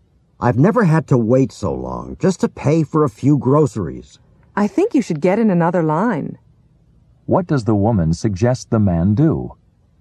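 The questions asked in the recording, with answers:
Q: What does the woman suggest the man do?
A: Get in another line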